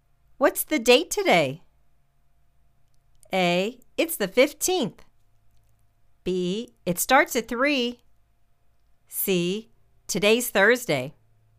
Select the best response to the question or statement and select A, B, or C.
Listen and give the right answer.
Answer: It's the 15th.